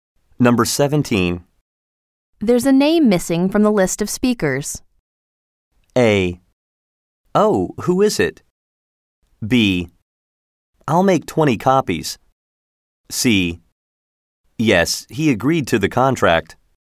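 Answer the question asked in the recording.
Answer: A: Oh, who is it?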